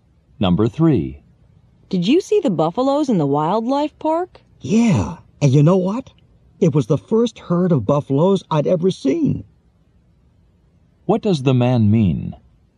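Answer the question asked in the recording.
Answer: He had never seen a buffalo herd before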